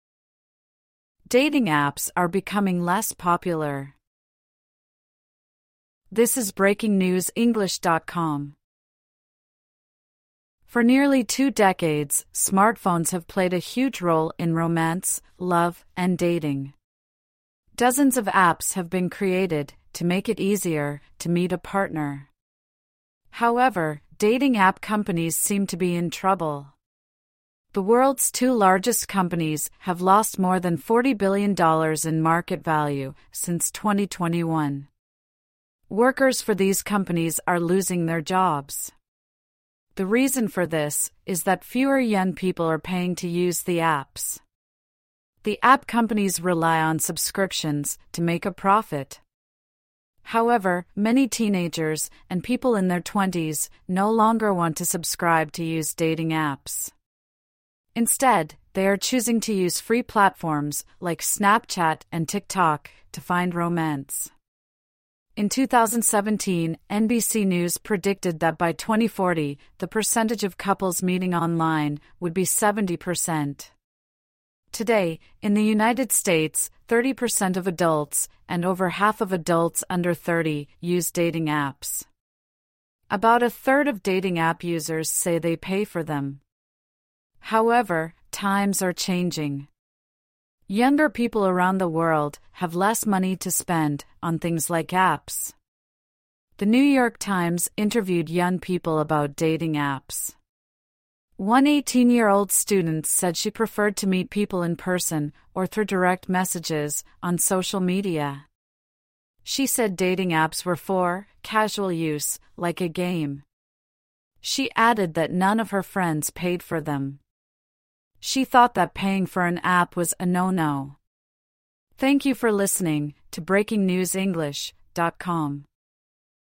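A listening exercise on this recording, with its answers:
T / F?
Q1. Online dating has been around for thirty years.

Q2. The article said there are hundreds of online dating apps.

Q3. Fewer young people want to pay for an online dating app.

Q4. Many people are using platforms like TikTok instead of dating apps.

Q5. Thirty per cent of adults in the USA use dating apps.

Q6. Younger people are richer but do not want to buy dating apps.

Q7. A student said she prefers to meet people in person rather than online.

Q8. Some of the student's friends have paid for a dating app.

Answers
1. F
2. F
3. T
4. T
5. T
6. F
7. T
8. F

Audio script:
Dating apps are becoming less popular
For nearly two decades, smartphones have played a huge role in romance, love and dating. Dozens of apps have been created to make it easier to meet a partner. However, dating app companies seem to be in trouble. The world's two largest companies have lost more than $40 billion in market value since 2021. 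Workers for these companies are losing their jobs. The reason for this is that fewer young people are paying to use the apps. The app companies rely on subscriptions to make a profit. However, many teenagers and people in their twenties no longer want to subscribe to use dating apps. Instead, they are choosing to use free platforms like Snapchat and TikTok to find romance.
In 2017, NBC News predicted that by 2040, the percentage of couples meeting online would be 70 per cent. Today in the United States, 30 per cent of adults, and over half of adults under 30, use dating apps. About a third of dating app users say they pay for them. However, times are changing. Younger people around the world have less money to spend on things like apps. The New York Times interviewed young people about dating apps. One 18-year-old student said she preferred to meet people in person or through direct messages on social media. 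She said dating apps were for "casual use, like a game". She added that none of her friends paid for them. She thought that paying for an app was a no-no.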